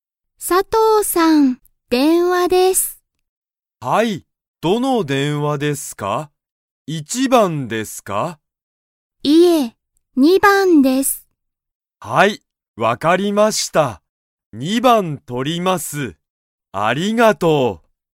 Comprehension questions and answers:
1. 佐藤(さとう)さんの電話(でんわ)は、どの電話(でんわ)ですか?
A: 二番(にばん)